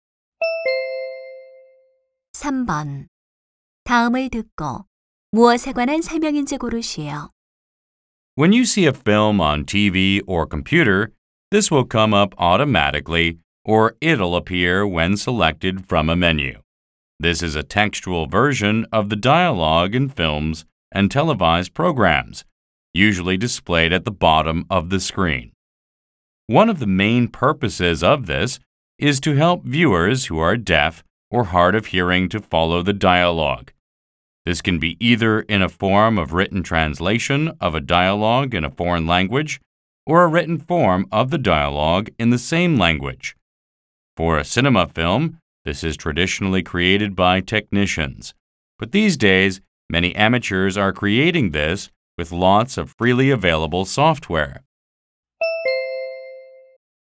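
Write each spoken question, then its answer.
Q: 다음을 듣고 무엇에 관한 설명인지 고르시오.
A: 자막 (subtitles)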